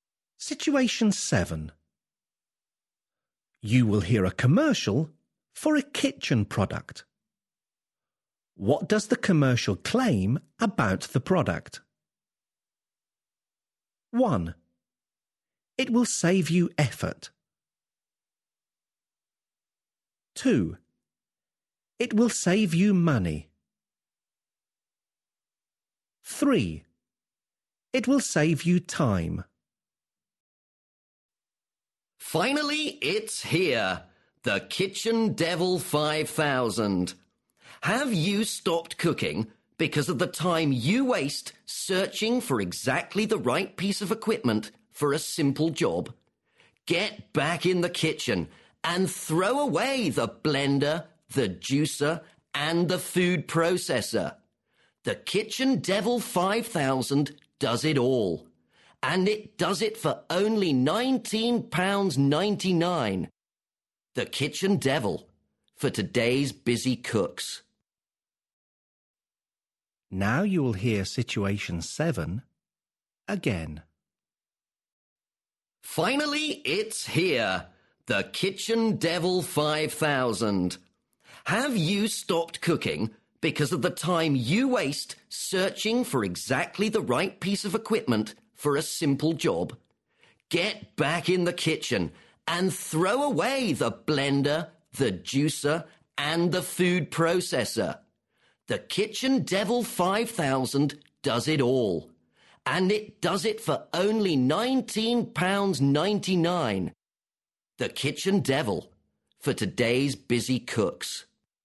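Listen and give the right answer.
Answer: 3: It will save you time.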